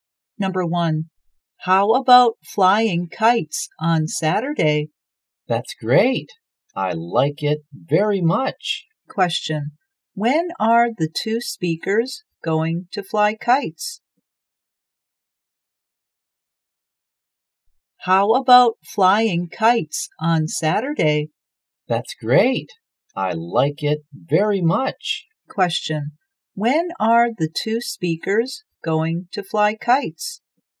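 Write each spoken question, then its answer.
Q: when are the two speakers going to fly kites?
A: On Saturday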